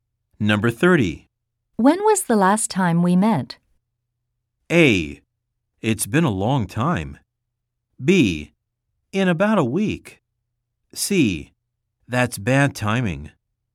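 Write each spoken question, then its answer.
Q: When was the last time we met?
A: A: It's been a long time.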